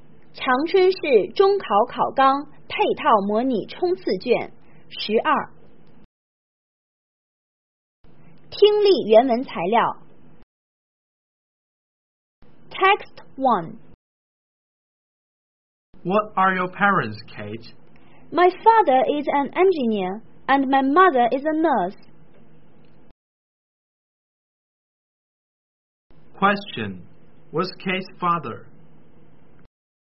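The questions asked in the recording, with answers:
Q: What's Kate's father?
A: An engineer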